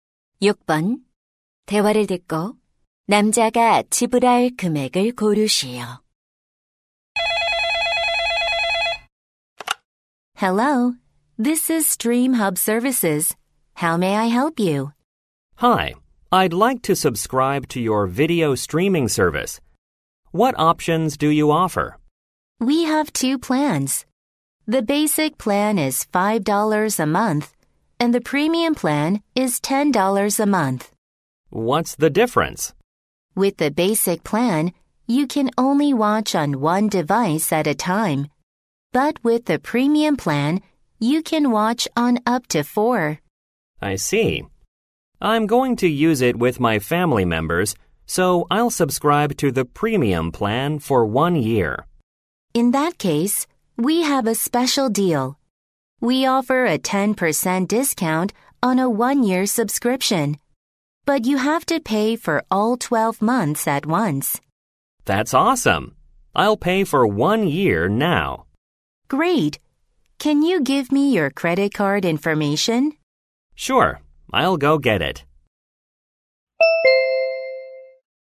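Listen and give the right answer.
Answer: 108달러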